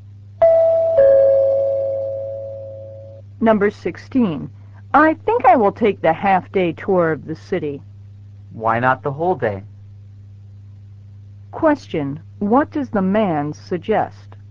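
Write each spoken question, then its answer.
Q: What does the man suggest?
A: Taking the whole-day tour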